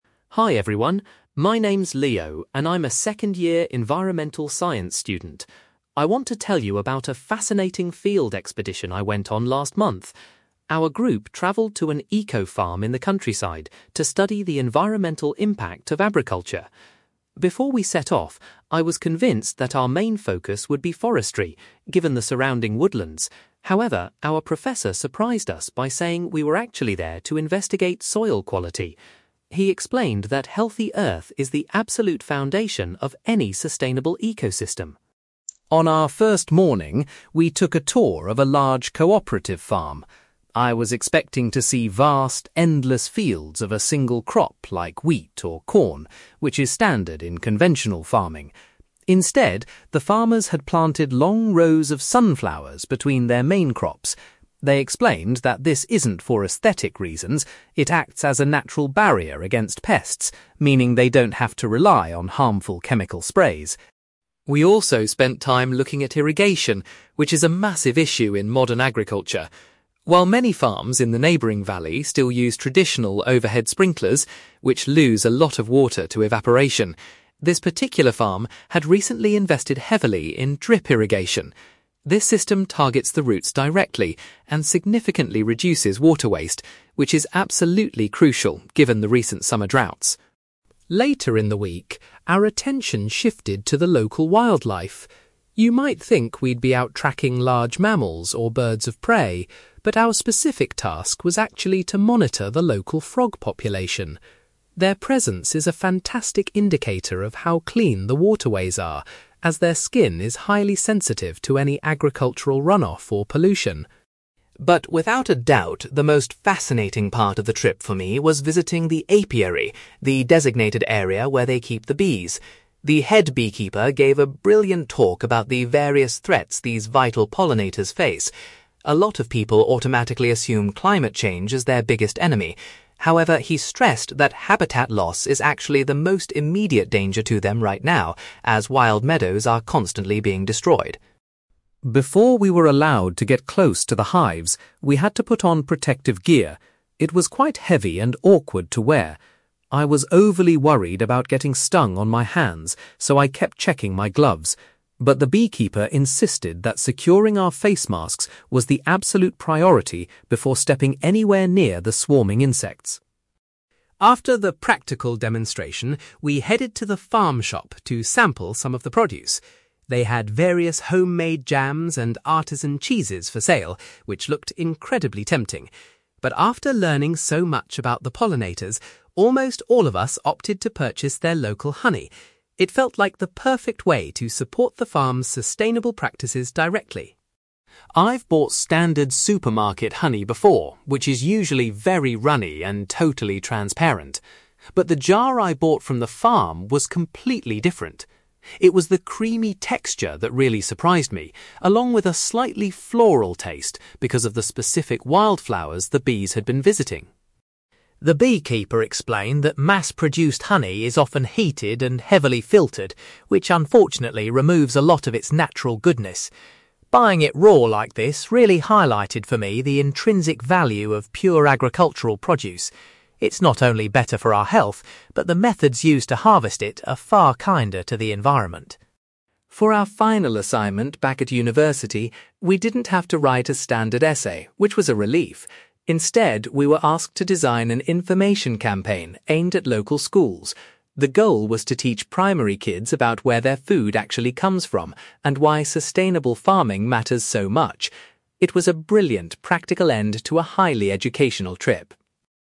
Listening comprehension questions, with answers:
You will hear a university student called Leo giving a presentation about a recent field expedition to an eco-farm. For questions 9-18, complete the sentences with a word or short phrase.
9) Leo hadn't expected that the expedition's main aim would be to examine (9)..................... .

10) Leo noticed that (10)..................... were grown alongside the primary crops as a natural pest defence.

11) The farm prevents water waste by using (11)..................... instead of traditional sprinklers.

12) The students checked the size of the (12)..................... to determine if the nearby rivers were polluted.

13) The beekeeper explained that (13)..................... poses the most severe risk to bees today.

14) The students were instructed to check their (14)..................... before walking close to the bees.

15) Instead of buying things like cheese or jam, the students decided to spend their money on (15)..................... .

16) Leo was amazed by the (16)..................... of the farm's produce compared to supermarket versions.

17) Buying raw goods helped Leo understand the (17)..................... of unprocessed agricultural foods.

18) The students' final project involved producing an (18)..................... to educate younger children about food sources.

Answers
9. soil quality
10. sunflowers
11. drip irrigation
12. frog population
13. habitat loss
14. face masks
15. local honey
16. creamy texture
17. intrinsic value
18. information campaign

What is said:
Leo: Hi everyone. My name's Leo, and I'm a second-year environmental science student. I want to tell you about a fascinating field expedition I went on last month. Our group travelled to an eco-farm in the countryside to study the environmental impact of agriculture. Before we set off, I was convinced that our main focus would be forestry, given the surrounding woodlands. However, our professor surprised us by saying we were actually there to investigate soil quality. He explained that healthy earth is the absolute foundation of any sustainable ecosystem.
On our first morning, we took a tour of a large cooperative farm. I was expecting to see vast, endless fields of a single crop like wheat or corn, which is standard in conventional farming. Instead, the farmers had planted long rows of sunflowers between their main crops. They explained that this isn't for aesthetic reasons; it acts as a natural barrier against pests, meaning they don't have to rely on harmful chemical sprays.
We also spent time looking at irrigation, which is a massive issue in modern agriculture. While many farms in the neighbouring valley still use traditional overhead sprinklers—which lose a lot of water to evaporation—this particular farm had recently invested heavily in drip irrigation. This system targets the roots directly and significantly reduces water waste, which is absolutely crucial given the recent summer droughts.
Later in the week, our attention shifted to the local wildlife. You might think we'd be out tracking large mammals or birds of prey, but our specific task was actually to monitor the local frog population. Their presence is a fantastic indicator of how clean the waterways are, as their skin is highly sensitive to any agricultural runoff or pollution.
But without a doubt, the most fascinating part of the trip for me was visiting the apiary—the designated area where they keep the bees. The head beekeeper gave a brilliant talk about the various threats these vital pollinators face. A lot of people automatically assume climate change is their biggest enemy. However, he stressed that habitat loss is actually the most immediate danger to them right now, as wild meadows are constantly being destroyed.
Before we were allowed to get close to the hives, we had to put on protective gear. It was quite heavy and awkward to wear. I was overly worried about getting stung on my hands, so I kept checking my gloves. But the beekeeper insisted that securing our face masks was the absolute priority before stepping anywhere near the swarming insects.
After the practical demonstration, we headed to the farm shop to sample some of the produce. They had various homemade jams and artisan cheeses for sale, which looked incredibly tempting. But, after learning so much about the pollinators, almost all of us opted to purchase their local honey. It felt like the perfect way to support the farm's sustainable practices directly.
I've bought standard supermarket honey before, which is usually very runny and totally transparent. But the jar I bought from the farm was completely different. It was the creamy texture that really surprised me, along with a slightly floral taste because of the specific wildflowers the bees had been visiting.
The beekeeper explained that mass-produced honey is often heated and heavily filtered, which unfortunately removes a lot of its natural goodness. Buying it raw like this really highlighted for me the intrinsic value of pure agricultural produce. It's not only better for our health, but the methods used to harvest it are far kinder to the environment.
For our final assignment back at university, we didn't have to write a standard essay, which was a relief. Instead, we were asked to design an information campaign aimed at local schools. The goal was to teach primary kids about where their food actually comes from and why sustainable farming matters so much. It was a brilliant, practical end to a highly educational trip.

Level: B2